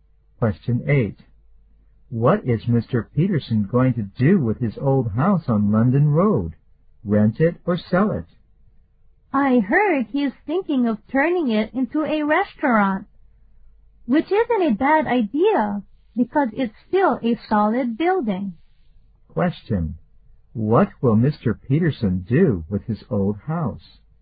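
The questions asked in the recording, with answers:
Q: What will Mr. Peterson do with his old house?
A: Turn it into a restaurant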